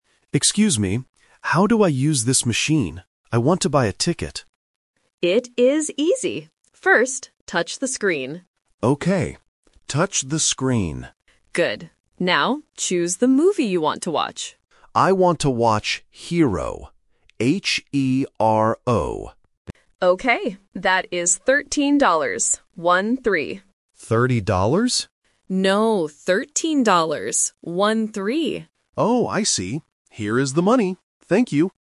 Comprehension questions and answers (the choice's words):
Listen to the conversation and choose the correct answer (A, B, or C).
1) What does the assistant tell the customer to do first?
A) Touch the screen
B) Choose the movie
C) Give the money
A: Touch the screen

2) What is the name of the movie?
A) Z-E-R-O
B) H-E-R-O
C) H-A-R-O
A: H-E-R-O

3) How much does the ticket cost?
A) $13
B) $30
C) $33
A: $13

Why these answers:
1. The correct answer is A. The assistant clearly says, "First, touch the screen." Option B (Choose the movie) is the trap because it is the second step, not the first. Option C (Give the money) is an action that happens at the end of the conversation.
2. The correct answer is B. The customer spells the movie name clearly: "H-E-R-O". Option A (Z-E-R-O) is a trap because "Zero" rhymes with "Hero" and sounds very similar. Option C (H-A-R-O) is a trap because the letters "E" and "A" are often confused by beginners.
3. The correct answer is A. The assistant says the ticket is "13 dollars. One-three." Option B ($30) is the trap because the customer mishears the price and asks "30 dollars?", and the numbers "thirteen" and "thirty" sound very similar. Option C is just a wrong number.